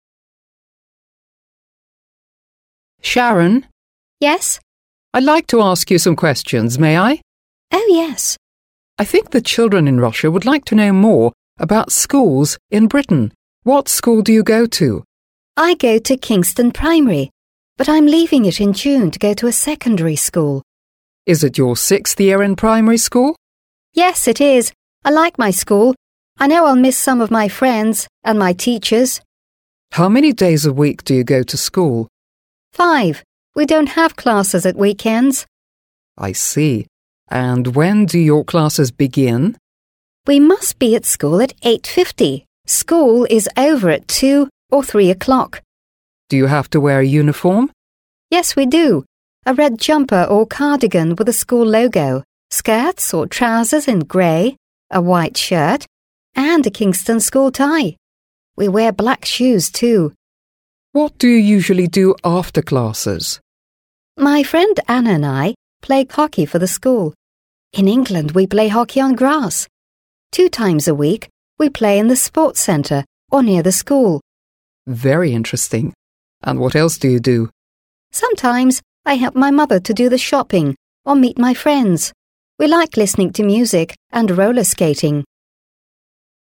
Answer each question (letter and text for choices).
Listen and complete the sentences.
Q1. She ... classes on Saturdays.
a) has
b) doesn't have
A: b) doesn't have

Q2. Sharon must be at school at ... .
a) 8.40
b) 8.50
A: b) 8.50

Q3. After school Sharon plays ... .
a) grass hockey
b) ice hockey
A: a) grass hockey

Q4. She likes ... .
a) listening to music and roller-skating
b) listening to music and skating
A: a) listening to music and roller-skating

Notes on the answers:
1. b) doesn't have – нет. В тексте говорится, что Шарон не учится по субботам, что типично для большинства образовательных систем, где занятия проводятся с понедельника по пятницу.
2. Это время начала занятий в школе, указывающее на строгие правила, которые соблюдаются всеми учениками.
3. a) grass hockey – хоккей на траве. Это вид спорта, в котором играют на открытом воздухе, и он включает в себя использование клюшек и мяча для игры на травяном поле.
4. a) listening to music and roller skating – слушать музыку и кататься на роликах. Эти занятия могут быть источником расслабления и веселья для Шарон, сочетая активность и приятное времяпрепровождение.

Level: 7 класс